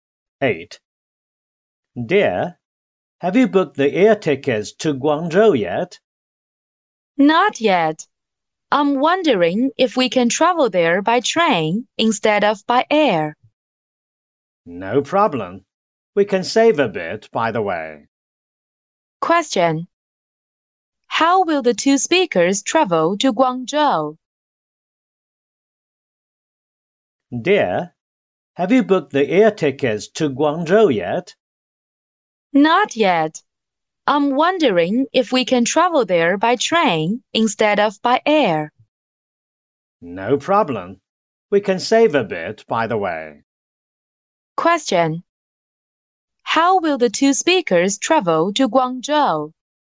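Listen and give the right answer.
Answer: By train.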